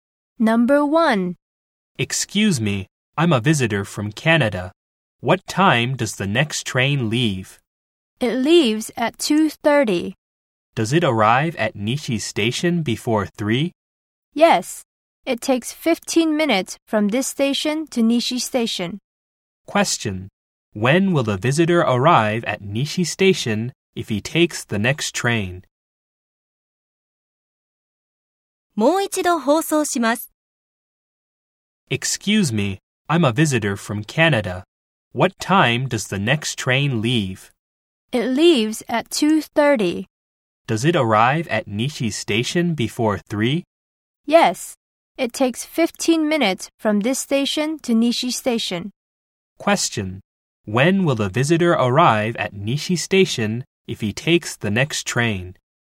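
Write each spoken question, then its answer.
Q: When will the visitor arrive at Nishi Station if he takes the next train?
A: At 2:45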